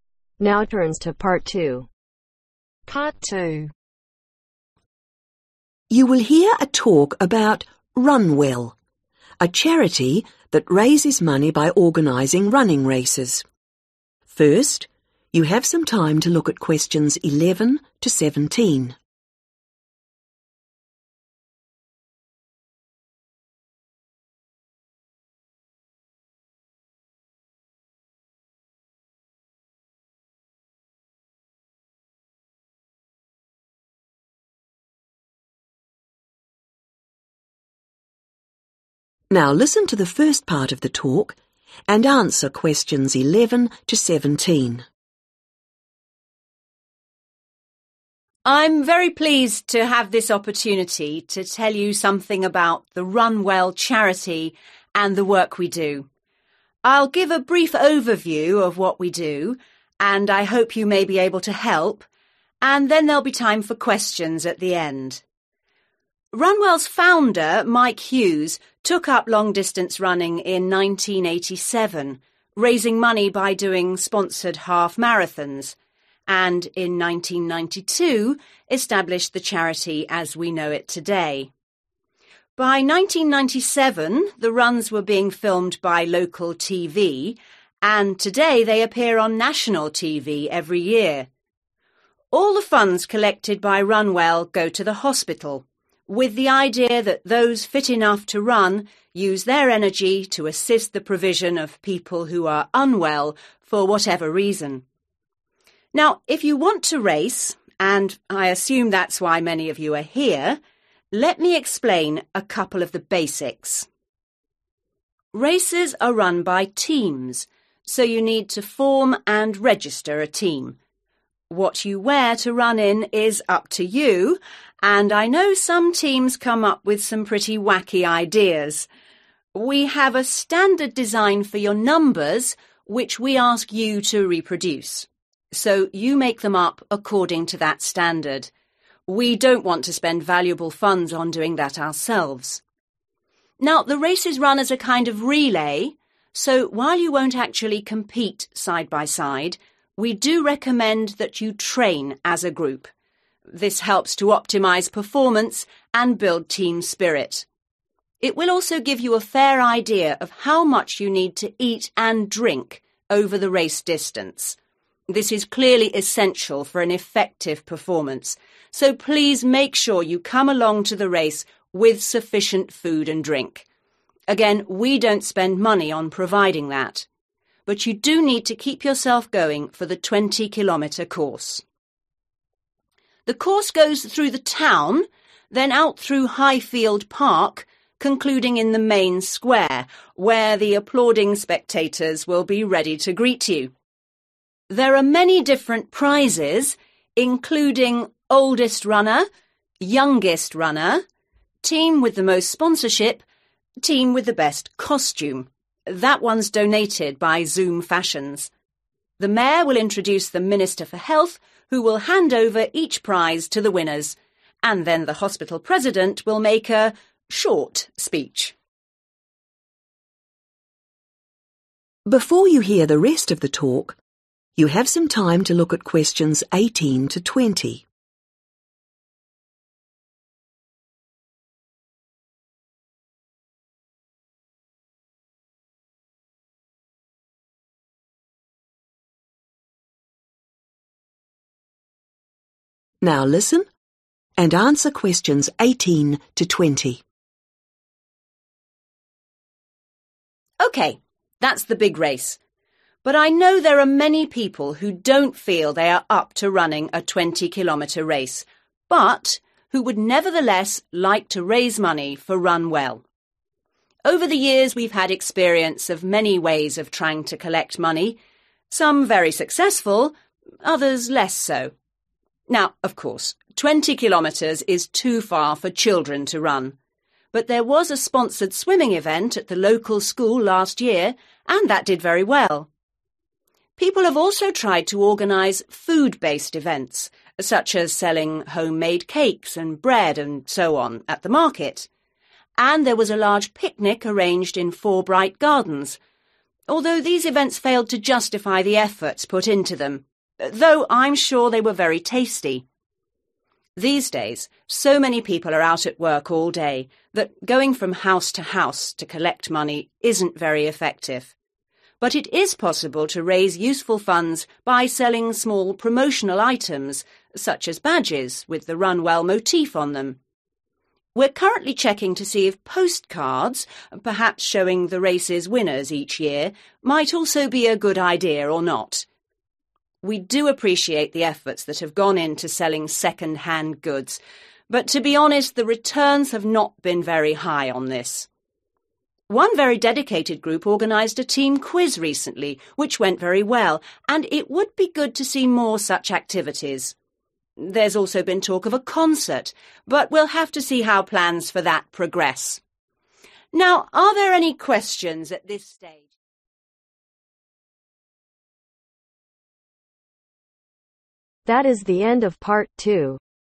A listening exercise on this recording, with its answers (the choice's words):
Complete the notes below. Write NO MORE THAN TWO WORDS AND/OR A NUMBER for each answer.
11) - Set up in (11)............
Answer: 1992

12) - Aim: raise money for the (12)............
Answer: Hospital

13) - Teams to supply own (13)............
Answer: Numbers

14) - Teams should (14)............ together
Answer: Train

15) - Important to bring enough (15)............ and drink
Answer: Food

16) - Race will finish in the (16)............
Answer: Main square

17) - Prizes given by the (17)............ for health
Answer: Minister

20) Which THREE ways of raising money for the charity are recommended ?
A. badges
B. bread and cake stall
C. swimming event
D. concert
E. door-to-door collecting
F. picnic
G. postcards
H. quiz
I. second-hand sale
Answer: quiz